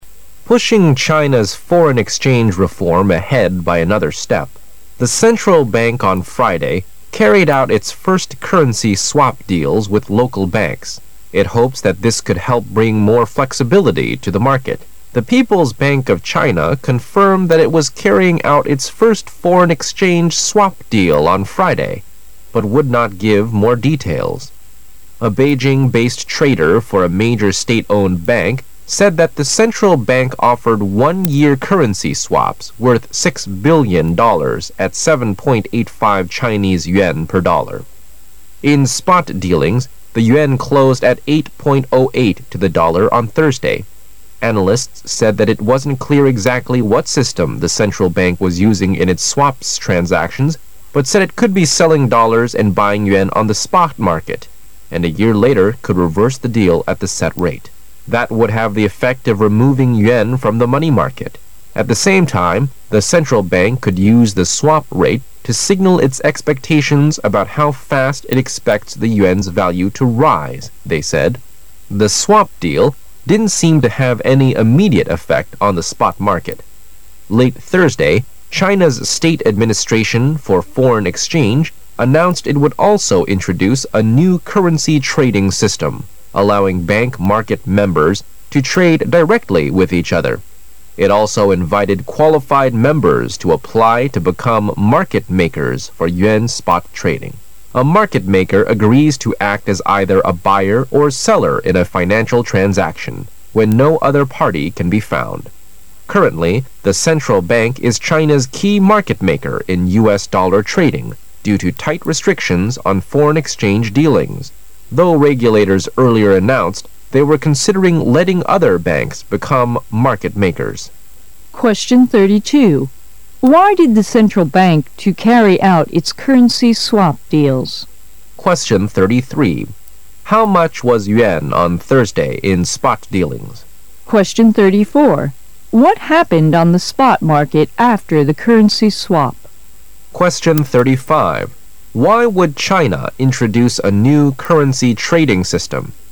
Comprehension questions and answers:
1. Why did the central bank to carry out its currency swap deals?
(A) It is one of the China's foreign exchange reform.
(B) It may bring flexibility to the market.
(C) It is in the former plan.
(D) They want to bring yuan to the spot market.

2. How much was yuan on Than on Thursday in spot dealings?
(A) 7.85 per dollar.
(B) 7.88 per dollar.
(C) 8.05 per dollar.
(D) 8.08 per dollar.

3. What happened on the spot market after the currency swap?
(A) Not allowing yuan and dollars to be sold on the market.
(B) Removing dollar from the money market.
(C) No any immediate effect on the spot market.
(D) A new currency system being used.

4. Why would China introduce a new currency trading system?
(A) To invite qualified members to trade with each other.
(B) To get more market makers to act as the China's key market maker.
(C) To allow bank market members to trade directly with each other.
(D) To loosen restrictions on foreign exchange dealings.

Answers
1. B
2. D
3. C
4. C

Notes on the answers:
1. 文中提到It hopes that this could help bring more flexibility to the market.,央行希望此举能够帮助金融市场获得更大的灵活性。所以答案为B)。此题答案紧接在提问句后面,较为容易听出来。
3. 文中提到The swap deal didn't seem to have any immediate effect on the spot market.,在货币市场上并未带来立竿见影的效果,从而可知答案C)符合文意。此题难在被选项均似是而非,每个选项在文中均有类似提及,如果把握不清很容易误选。

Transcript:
[解析] 32-35 Pushing China's foreign exchange reform ahead by another step, the central bank on Friday carried out its first currency swap deals with local banks. It hopes that this could help bring more flexibility to the market. The People's Bank of China confirmed that it was carrying out its first foreign exchange swap deal on Friday, but would not give more details. A Beijing-based trader for a major state-owned bank said that the central bank offered one-year currency swaps worth $ 6 billion at 7.85 Chinese yuan per dollar. In spot dealings, the yuan closed at 8.08 to the dollar on Thursday. Analysts said that it wasn't clear exactly what system the central bank was using in its swaps transactions, but said it could be selling dollars and buying yuan on the spot market, and a year later could reverse the deal at the set rate. That would have the effect of removing yuan from the money market. At the same time, the central bank could use the swap rate to signal its expectations about how fast it expects the yuan's value to rise, they said. Tile swap deal didn't seem to have any immediate effect on the spot market. Late Thursday, China's State Administration for Foreign Exchange announced it would also introduce a new currency trading system allowing bank market members to trade directly with each other. It also invited qualified members to apply to become market makers for yuan spot trading. A market maker agrees to act as either a buyer or seller in a financial transaction when no other party can be found. Currently, the central bank is China's key market maker in U.S. dollar trading due to tight restrictions on for eign exchange dealings, though regulators earlier announced they were considering letting other banks become market makers.

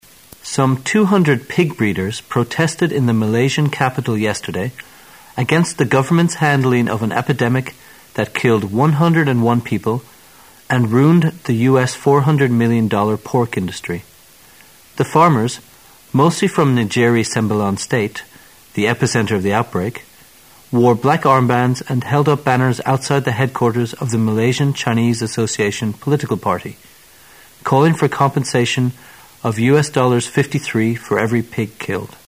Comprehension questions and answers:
Questions 25 and 26 are based on the following news. At the end of the news item, you will be given 10 seconds to answer the questions. Now listen to the news.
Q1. How many people lost their lives in the epidemic?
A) 200.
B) 101.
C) 400.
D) 53.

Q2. What did the pig breeders call for in their protest?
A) Killing pigs.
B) Compensation.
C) A nationwide strike.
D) An end to the epidemic.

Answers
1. B
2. B

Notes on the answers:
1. 本题测试有关人数的细节内容的理解能力。可从文中直接找到具体数字,即选项B:101。
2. 本题测试对具体内容的理解能力。根据新闻的尾句"calling for compensation Of U.S.$53 for every pig killed",可得出正确答案为B。

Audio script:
[解析] 25-26 Some 200 pig breeders protested in the Malaysian capital yesterday against the government's handling of an epidemic that killed 101 people and ruined the U. $400 million pork industry. The farmers, mostly from Negeri Sembilan state, the epicenter of the outbreak, wore black armbands and held up banners outside the headquarters of the Malaysian Chinese Association political party, calling for compensation of U.S. $53 for every pig killed.

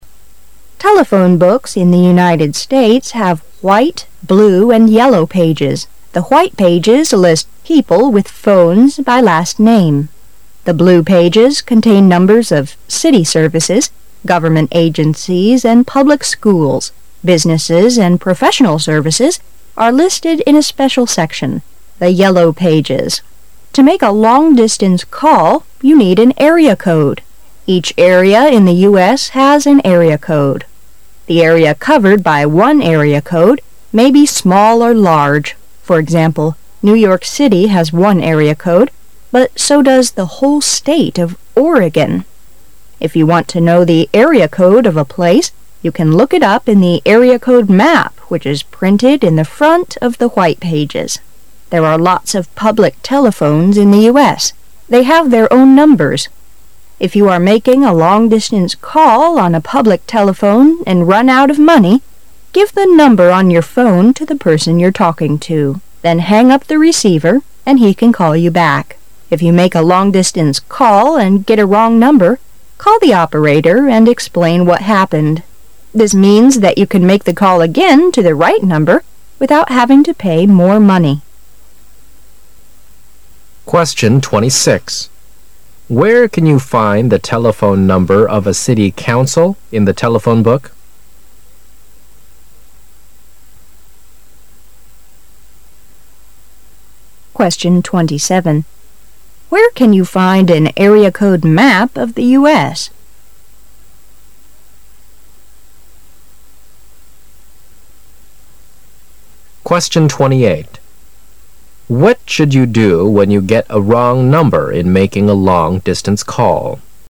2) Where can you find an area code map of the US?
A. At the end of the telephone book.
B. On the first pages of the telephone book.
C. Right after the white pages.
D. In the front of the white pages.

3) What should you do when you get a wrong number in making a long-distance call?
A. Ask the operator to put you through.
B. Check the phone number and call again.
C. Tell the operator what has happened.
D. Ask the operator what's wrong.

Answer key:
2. D
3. C

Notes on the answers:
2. 事实细节题。文章第二段最后一句提到"If you want to know the area code of a place,... in the front of the white pages."(如果你想知道某地区的区号,你可以在门页前面的区号地图上找到。)由此可知, D)项为正确答案。
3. 事实细节题。文章最后两句提到"If you make a long-distance call... having to pay more money."(如果你在打长途电话时拨错号码,打电话把情况告诉接线员,你无需冉花钱就能够再次拨通正确的号码。)由此可知,C)项为正确答案。

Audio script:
[解析] 26-28 Telephone books in the United States have white, blue and yellow pages. The white pages list people with phones by last name. The blue pages contain numbers of city services, government agencies, and public schools. Businesses and professional services are listed in a special section--the Yellow Pages. To make a long-distance call, you need an area code. Each area in the US has an area code. The area covered by one area code may be small or large. For example, New York City has one area code, but so does the whole state of Oregon. If you want to know the area code of a place, you can look it up in the area code map which is printed in the front of the white pages. There are lots of public telephones in the US. They have their own numbers. If you are making a long-distance call on a public telephone and run out of money, give the number on your phone to the person you're talking to. Then hang up the receiver and he can call you back. If you make a long-distance call and get a wrong number, call the operator and explain what happened. This means that you can make the call again to the right number without having to pay more money. Where can you find the telephone number of a city council in the telephone book?

